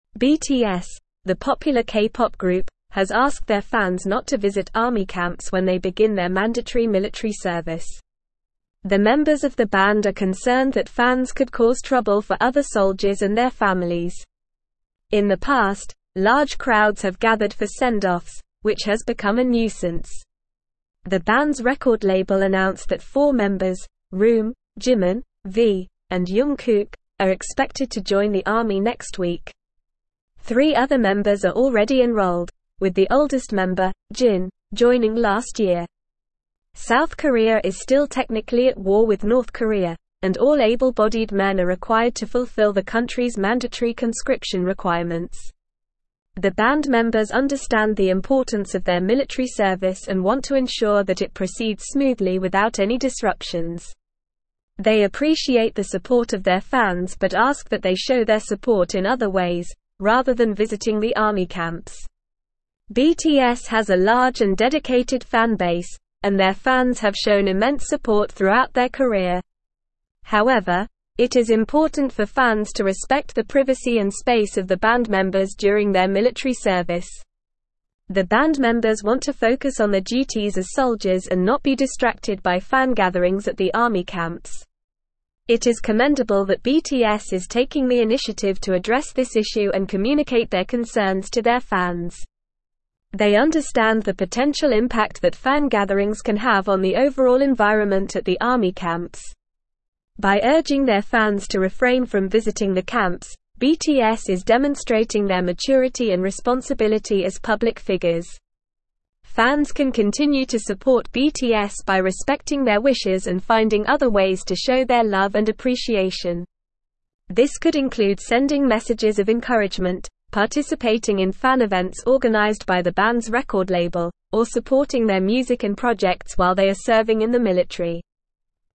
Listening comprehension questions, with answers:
Listen and Fill in the Gaps:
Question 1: BTS, the popular K-pop group, has (1)______ their fans not to visit army camps when they begin their mandatory military service.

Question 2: The (2)______ of the band are concerned that fans could cause trouble for other soldiers and their families.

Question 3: In the past, large crowds have (3)______ for send-offs, which has become a (4)______.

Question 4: In the past, large crowds have (3)______ for send-offs, which has become a (4)______.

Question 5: (5)______ Korea is still technically at war with North Korea, and all able-bodied men are (6)______ to fulfill the country's mandatory conscription requirements.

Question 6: (5)______ Korea is still technically at war with North Korea, and all able-bodied men are (6)______ to fulfill the country's mandatory conscription requirements.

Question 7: The band members understand the importance of their (7)______ service and want to ensure that it proceeds smoothly without any disruptions.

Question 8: They appreciate the support of their fans but ask that they show their support in other ways, rather than (8)______ the army camps.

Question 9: BTS has a large and dedicated fan base, and their fans have shown immense (9)______ throughout their career.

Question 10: The band members want to (10)______ on their duties as soldiers and not be distracted by fan (11)______ at the army camps.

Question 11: The band members want to (10)______ on their duties as soldiers and not be distracted by fan (11)______ at the army camps.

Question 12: They understand the potential (12)______ that fan gatherings can have on the overall environment at the army camps.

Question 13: By urging their fans to (13)______ from visiting the camps, BTS is demonstrating their maturity and responsibility as public figures.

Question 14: This could include sending messages of encouragement, participating in fan events organized by the band's (14)______ label, or supporting their (15)______ and (16)______ while they are serving in the military.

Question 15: This could include sending messages of encouragement, participating in fan events organized by the band's (14)______ label, or supporting their (15)______ and (16)______ while they are serving in the military.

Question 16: This could include sending messages of encouragement, participating in fan events organized by the band's (14)______ label, or supporting their (15)______ and (16)______ while they are serving in the military.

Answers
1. asked
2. members
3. gathered
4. nuisance
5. South
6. required
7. military
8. visiting
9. support
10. focus
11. gatherings
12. impact
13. refrain
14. record
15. music
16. projects

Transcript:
BTS, the popular K-pop group, has asked their fans not to visit army camps when they begin their mandatory military service. The members of the band are concerned that fans could cause trouble for other soldiers and their families. In the past, large crowds have gathered for send-offs, which has become a nuisance. The band's record label announced that four members, RM, Jimin, V, and Jung Kook, are expected to join the army next week. Three other members are already enrolled, with the oldest member, Jin, joining last year.
South Korea is still technically at war with North Korea, and all able-bodied men are required to fulfill the country's mandatory conscription requirements. The band members understand the importance of their military service and want to ensure that it proceeds smoothly without any disruptions. They appreciate the support of their fans but ask that they show their support in other ways, rather than visiting the army camps.
BTS has a large and dedicated fan base, and their fans have shown immense support throughout their career. However, it is important for fans to respect the privacy and space of the band members during their military service. The band members want to focus on their duties as soldiers and not be distracted by fan gatherings at the army camps.
It is commendable that BTS is taking the initiative to address this issue and communicate their concerns to their fans. They understand the potential impact that fan gatherings can have on the overall environment at the army camps. By urging their fans to refrain from visiting the camps, BTS is demonstrating their maturity and responsibility as public figures.
Fans can continue to support BTS by respecting their wishes and finding other ways to show their love and appreciation. This could include sending messages of encouragement, participating in fan events organized by the band's record label, or supporting their music and projects while they are serving in the military.

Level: Level 4